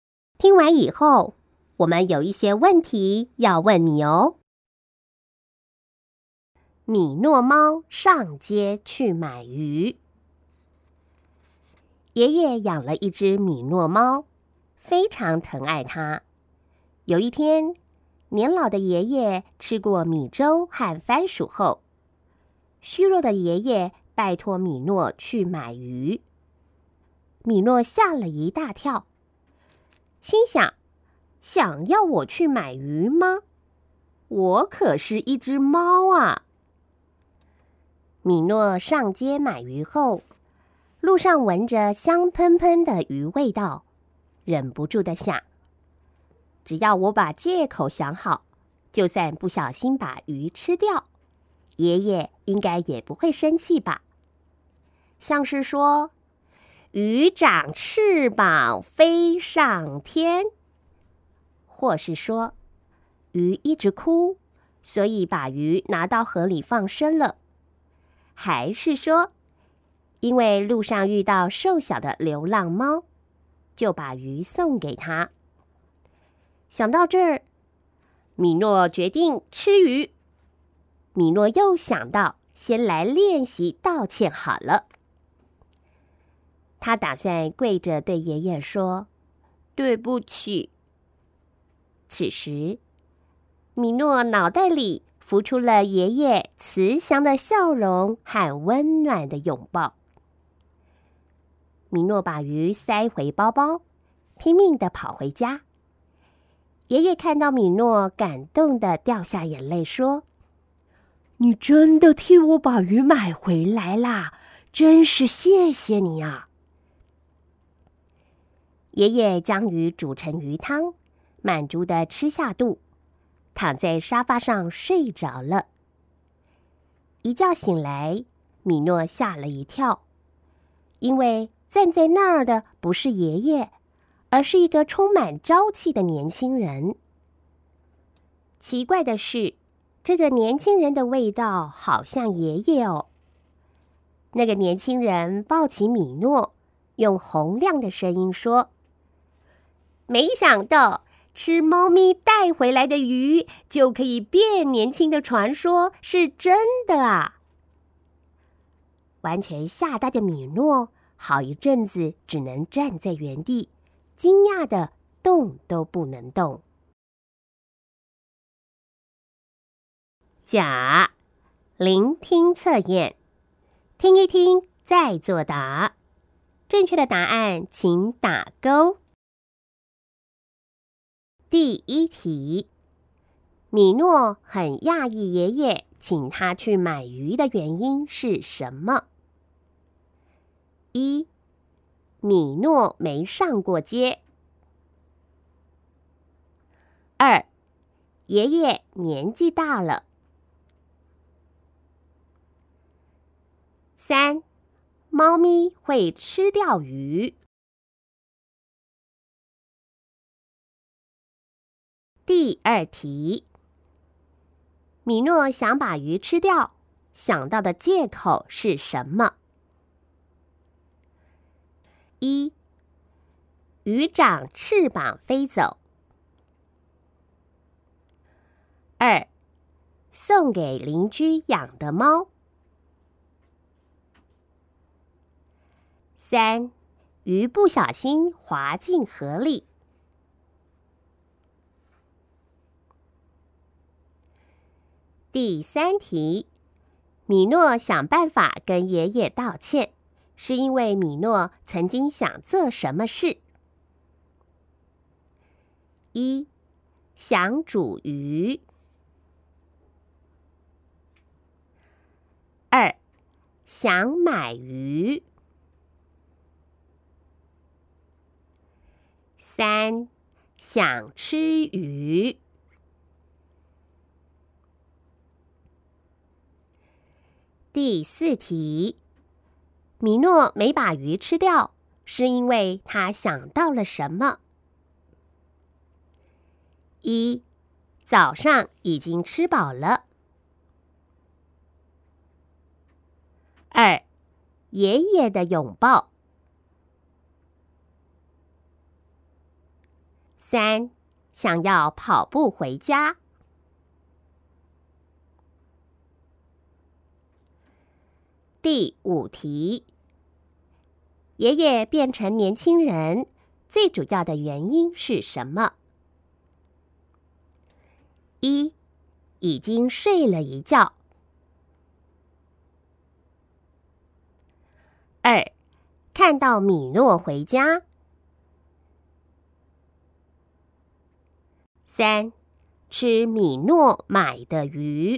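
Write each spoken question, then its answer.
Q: 米诺很讶异爷爷请他去买鱼的原因是什么?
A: 三: 猫咪会吃掉鱼

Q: 米诺想把鱼吃掉,想到的借口是什么?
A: 一: 鱼长翅膀飞走

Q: 米诺想办法跟爷爷道歉,是因为米诺曾经想做什么事?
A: 三: 想吃鱼

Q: 米诺没把鱼吃掉,是因为他想到了什么?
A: 二: 爷爷的拥抱

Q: 爷爷变成年轻人,最主要的原因是什么?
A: 三: 吃米诺买的鱼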